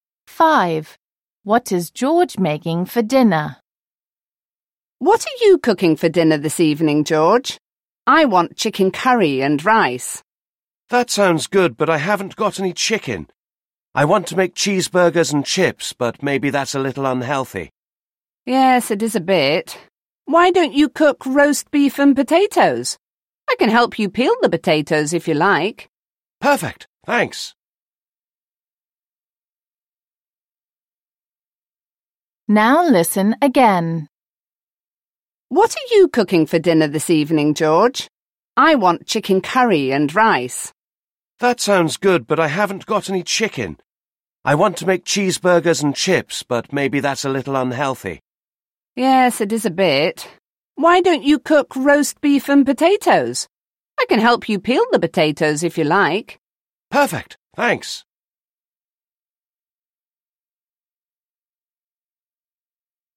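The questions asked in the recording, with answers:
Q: What is George making for dinner?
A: Roast beef and potatoes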